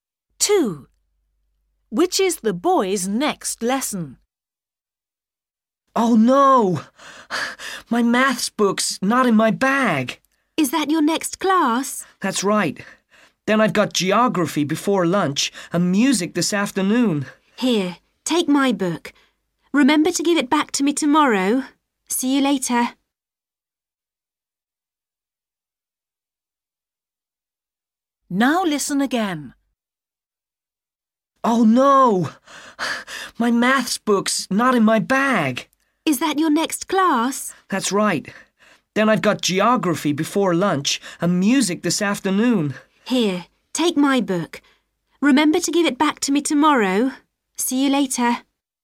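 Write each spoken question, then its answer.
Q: Which is the boy's next lesson?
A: maths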